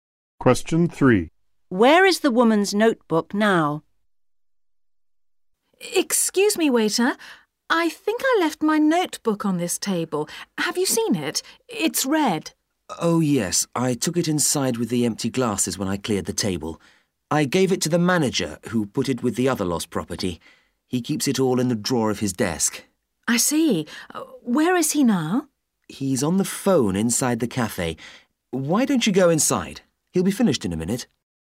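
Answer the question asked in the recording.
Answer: In the drawer of the manager's desk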